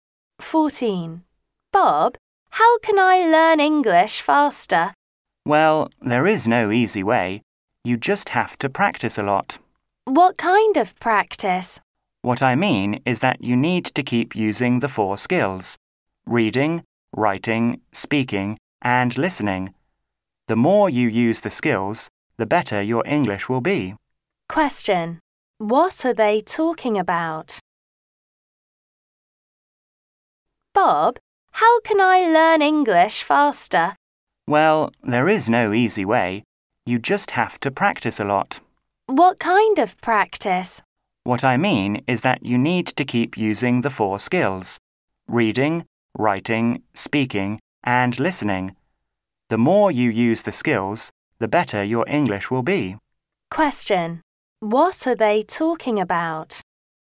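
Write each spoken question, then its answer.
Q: What are they talking about?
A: How to learn English faster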